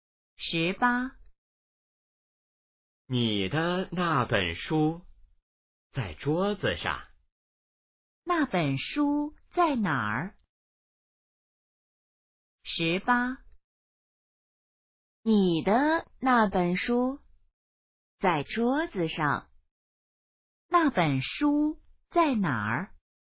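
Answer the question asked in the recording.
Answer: 在桌子上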